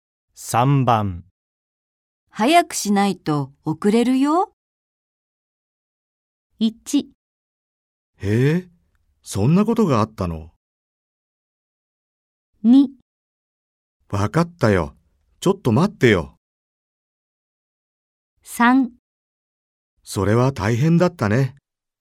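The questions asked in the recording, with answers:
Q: 早くしないと遅れるよ。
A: 2: わかったよ。ちょっと待ってよ。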